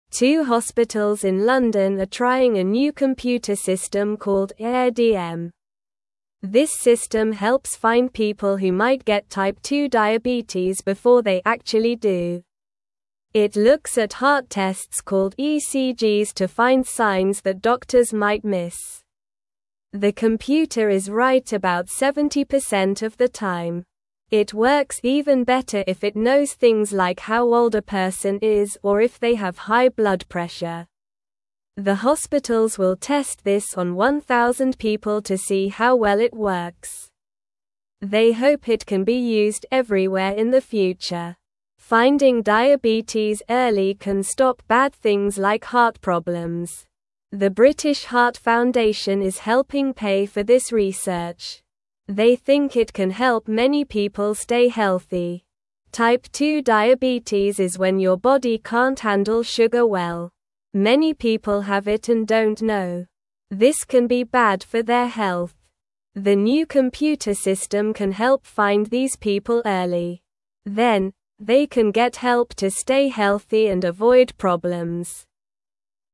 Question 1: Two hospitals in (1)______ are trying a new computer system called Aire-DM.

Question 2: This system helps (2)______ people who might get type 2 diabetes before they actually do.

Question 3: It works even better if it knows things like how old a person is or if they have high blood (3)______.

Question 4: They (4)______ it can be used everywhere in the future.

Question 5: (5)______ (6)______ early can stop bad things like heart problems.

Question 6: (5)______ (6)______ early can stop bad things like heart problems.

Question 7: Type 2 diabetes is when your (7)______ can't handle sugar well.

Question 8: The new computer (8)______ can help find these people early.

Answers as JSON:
{"1": "London", "2": "find", "3": "pressure", "4": "hope", "5": "Finding", "6": "diabetes", "7": "body", "8": "system"}

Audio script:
Two hospitals in London are trying a new computer system called Aire-DM. This system helps find people who might get type 2 diabetes before they actually do. It looks at heart tests called ECGs to find signs that doctors might miss. The computer is right about 70% of the time. It works even better if it knows things like how old a person is or if they have high blood pressure.
The hospitals will test this on 1,000 people to see how well it works. They hope it can be used everywhere in the future. Finding diabetes early can stop bad things like heart problems. The British Heart Foundation is helping pay for this research. They think it can help many people stay healthy.
Type 2 diabetes is when your body can't handle sugar well. Many people have it and don't know. This can be bad for their health. The new computer system can help find these people early. Then, they can get help to stay healthy and avoid problems.

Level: Level 1